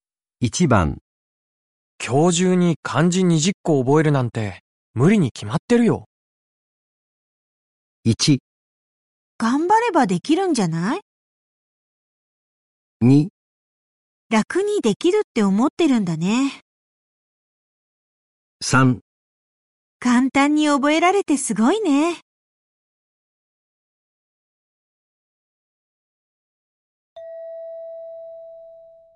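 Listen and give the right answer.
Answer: 1: 頑張ればできるんじゃない?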